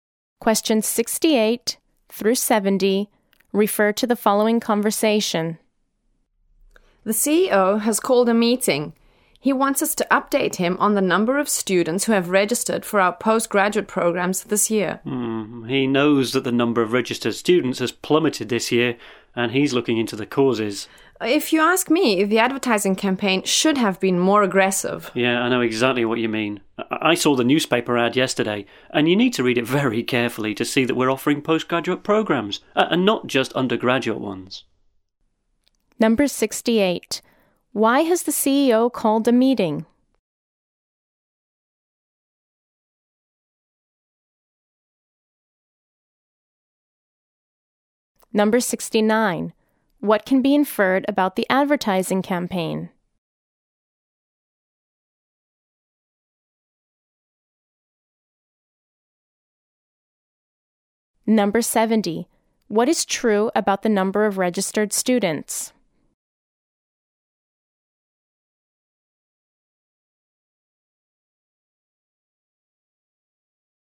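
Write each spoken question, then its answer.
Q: Why has the CEO called a meeting?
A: To get an update on the number of students registered for postgraduate programs.

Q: What can be inferred about the advertising campaign?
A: It was not aggressive enough; it did not make the postgraduate programs clear.

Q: What is true about the number of registered students?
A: It has dropped sharply this year.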